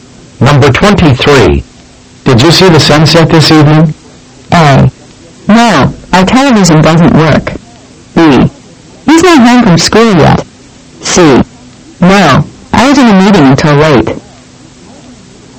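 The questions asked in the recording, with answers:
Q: Did you see the sunset this evening?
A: C: No, I was in a meeting until late.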